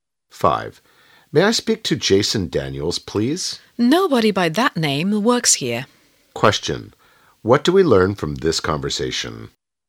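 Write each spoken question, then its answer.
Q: Question. What do we learn from this conversation?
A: Jason Daniels doesn't work there; the man called the wrong place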